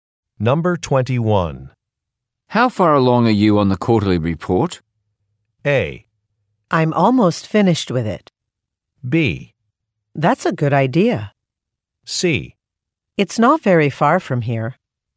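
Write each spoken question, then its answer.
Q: How far along are you on the quarterly report?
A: A: I'm almost finished with it.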